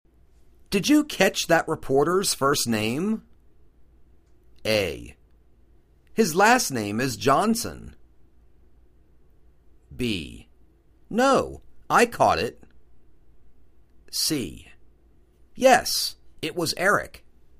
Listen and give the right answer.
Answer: Yes, it was Eric.